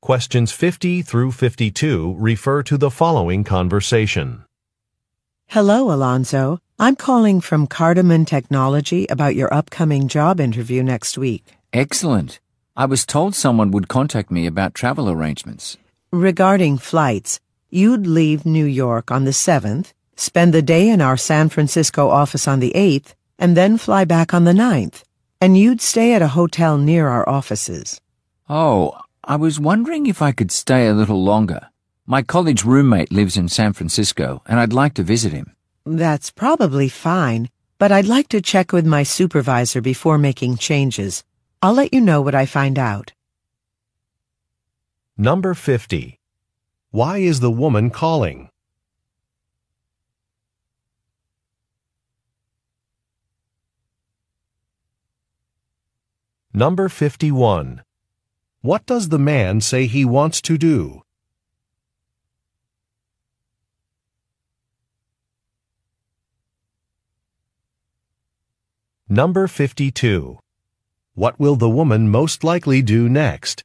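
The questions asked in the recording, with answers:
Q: Why is the woman calling?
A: To discuss travel arrangements for the man's job interview

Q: What does the man say he wants to do?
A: Stay longer in San Francisco to visit his college roommate

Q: What will the woman most likely do next?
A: Check with her supervisor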